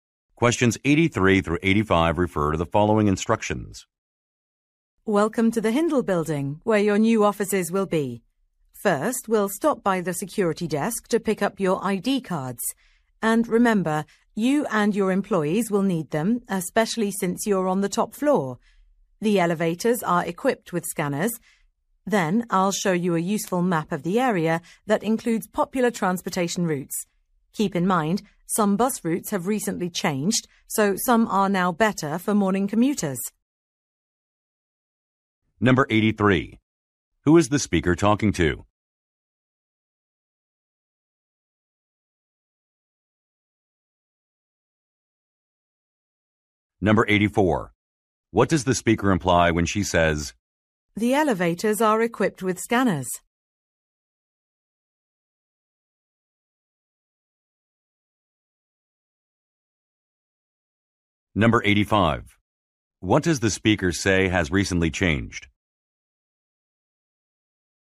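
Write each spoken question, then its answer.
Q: What does the speaker say has recently changed?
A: Some bus routes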